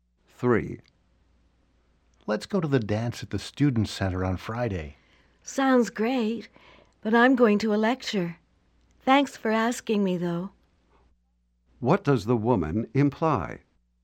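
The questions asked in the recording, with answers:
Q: What does the woman imply?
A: She can't go to the dance because she's going to a lecture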